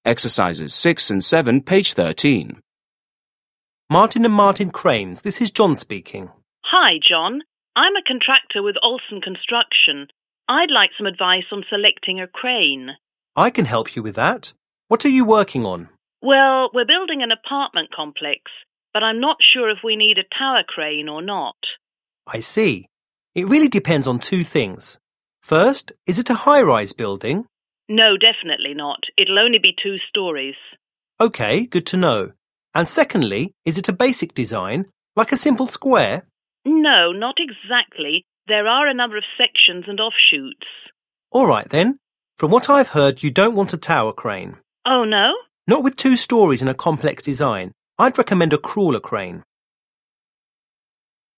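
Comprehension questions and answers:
6. Listen to a conversation between a contractor and an employee. Choose the correct answers.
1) The woman is building a high-rise apartment complex.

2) The building will have a simple square design.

7. Listen again and complete the conversation.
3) I'd 1._______ _______ _______on selecting a crane.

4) What are you 2 ______ ________?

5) But I'm not sure If we need a 3 _______ _______ ________.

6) First, is it a 4 _______ _______ _______?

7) Employee: Okay, 5______ ______ ______.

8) Contractor: No, 6_____ ______.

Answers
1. F
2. F
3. like some advice
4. working on
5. tower crane or not
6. high-rise building
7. good to know
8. not exactly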